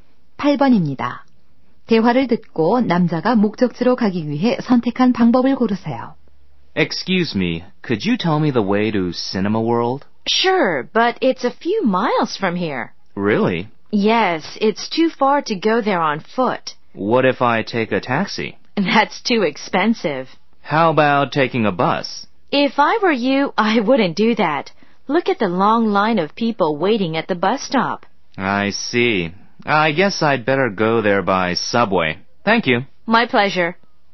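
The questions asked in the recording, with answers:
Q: 대화를 듣고 남자가 목적지로 가기 위해 선택한 방법을 고르세요.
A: 지하철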